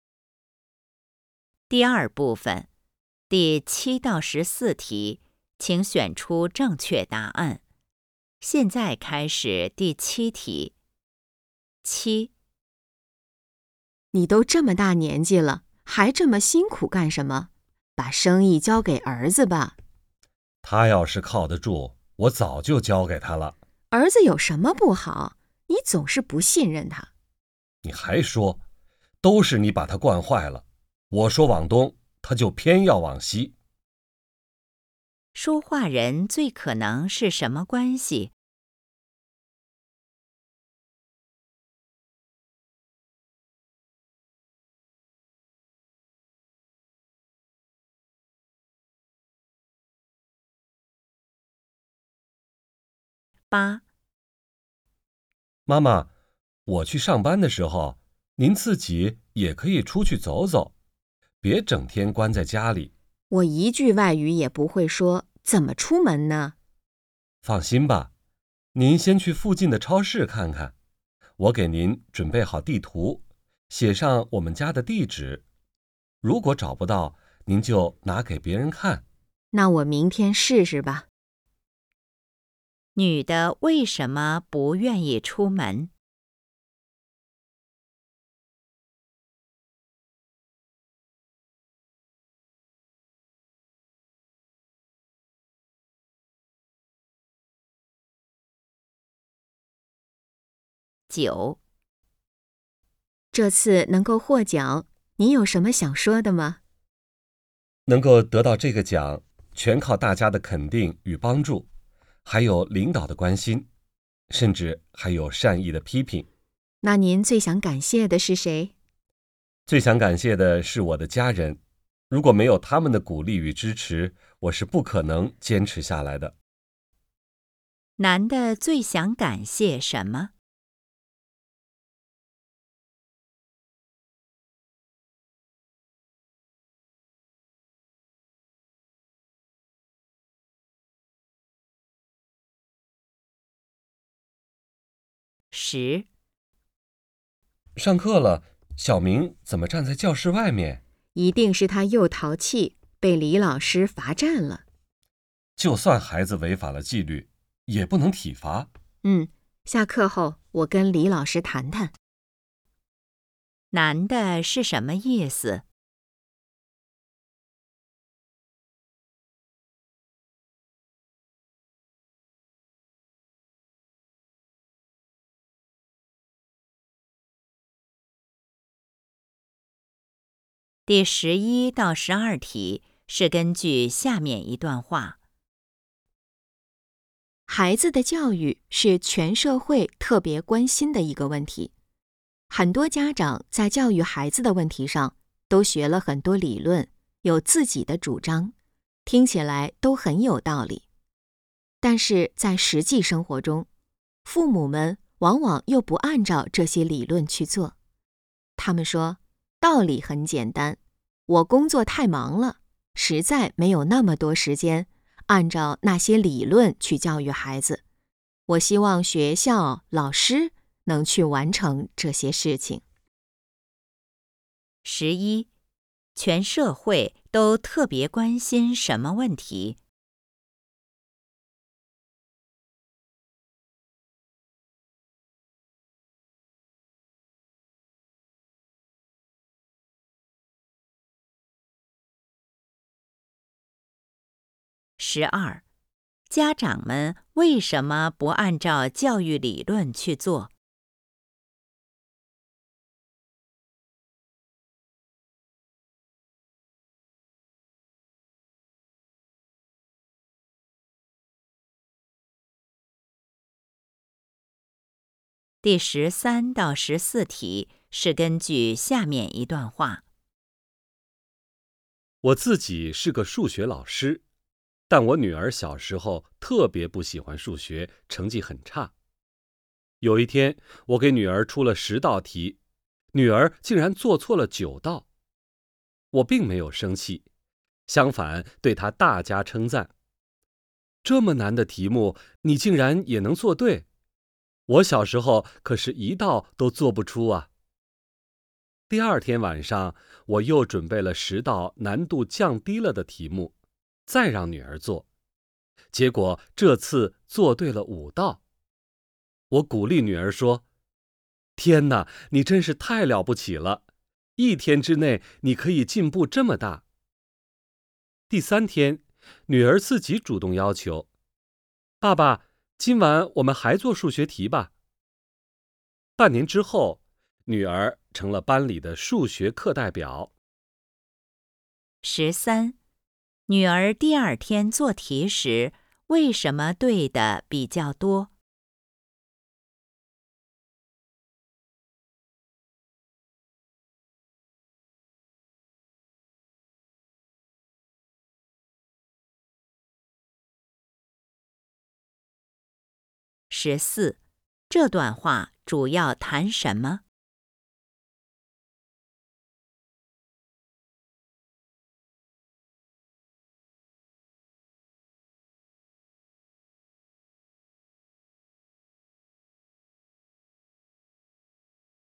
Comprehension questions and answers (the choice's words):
第7-14题:请选择出正确答案。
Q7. 说话人最可能是什么关系?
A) 父子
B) 师生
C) 夫妻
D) 同事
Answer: 夫妻

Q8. 女的为什么不愿意出门?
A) 没有地图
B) 语言不通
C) 不知道地址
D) 儿子要去上班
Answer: 语言不通

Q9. 男的最想感谢什么?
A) 领导的关心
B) 大家的帮助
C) 家人的支持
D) 家人的批评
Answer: 家人的支持

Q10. 男的是什么意思?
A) 小明应该被罚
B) 小明太淘气了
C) 老师不该体罚小明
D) 小明没有违反纪律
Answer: 老师不该体罚小明

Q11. 全社会都特别关心什么问题?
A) 孩子的教育问题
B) 家长的工作问题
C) 学校的问题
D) 老师的问题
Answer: 孩子的教育问题

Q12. 家长们为什么不按照教育理论去做?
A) 他们不同意这些理论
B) 他们不关心这些理论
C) 他们没学过这些理论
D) 他们没有时间这么做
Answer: 他们没有时间这么做

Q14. 这段话主要谈什么?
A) 怎么提高成绩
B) 孩子需要鼓励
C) 老师要懂教育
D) 学习需要兴趣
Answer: 孩子需要鼓励

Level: HSK 5